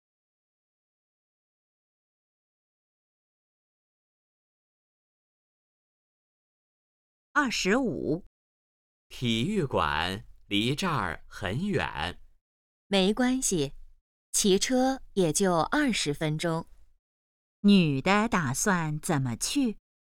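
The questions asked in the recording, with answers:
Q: 女的打算怎么去?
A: 骑车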